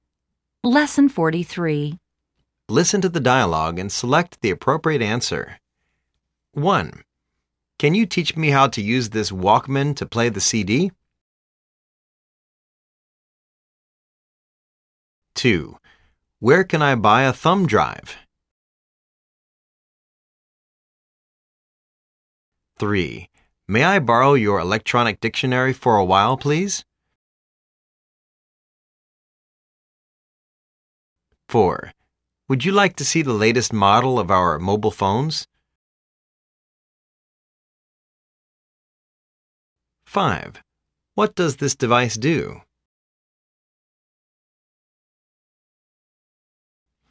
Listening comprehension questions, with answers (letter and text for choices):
Listen to the dialogues and select the appropriate answers.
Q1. Can you teach me how to use this walkman to play the CD?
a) Sure. lt's very easy to carry, particularly when you are having an outdoor picnic.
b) Sure. Select the play option: "CD." Like this. Then, press this button to play CD.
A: b) Sure. Select the play option: "CD." Like this. Then, press this button to play CD.

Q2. Where can I buy a thumb drive?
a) In a mega supermarket.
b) In an IT mall.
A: b) In an IT mall.

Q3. May I borrow your electronic dictionary for a while please?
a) Yes. Just take it.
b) Yes. Just take a rest.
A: a) Yes. Just take it.

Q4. Would you like to see the latest model of our mobile phones?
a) Yes. l'd love to.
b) No. I don't mind.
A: a) Yes. l'd love to.

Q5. What does this device do?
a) It measures the temperature of the oil that you are boiling.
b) It is made in Taiwan.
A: a) It measures the temperature of the oil that you are boiling.